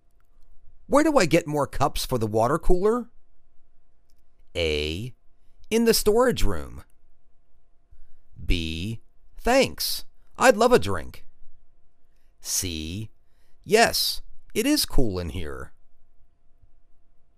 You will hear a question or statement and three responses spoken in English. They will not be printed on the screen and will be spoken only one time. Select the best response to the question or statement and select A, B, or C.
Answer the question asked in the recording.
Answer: In the storage room.